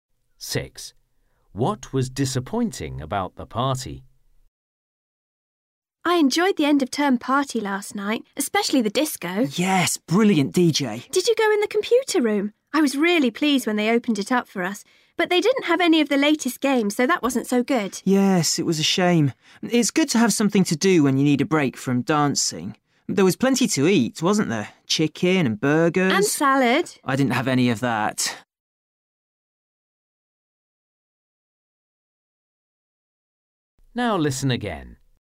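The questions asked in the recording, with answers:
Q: What was disappointing about the party?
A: the computer room didn't have the latest games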